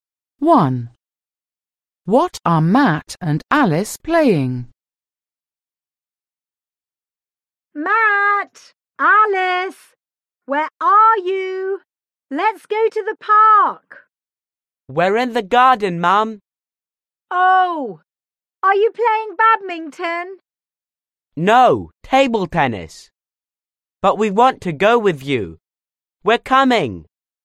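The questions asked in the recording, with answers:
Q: What are Matt and Alice playing?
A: table tennis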